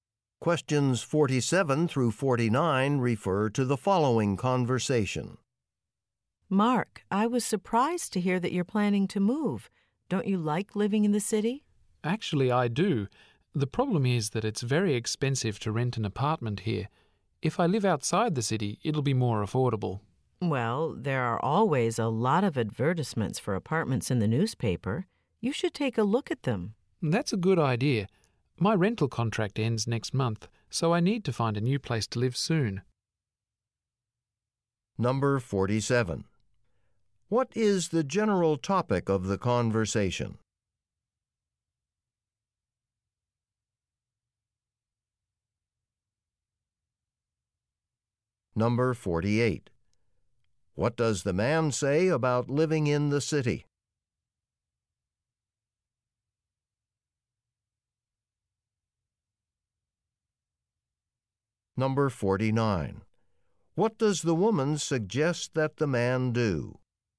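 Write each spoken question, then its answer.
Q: What is the general topic of the conversation?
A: The man's plan to move to a new apartment

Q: What does the man say about living in the city?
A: Renting an apartment there is very expensive

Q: What does the woman suggest that the man do?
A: Look at the apartment advertisements in the newspaper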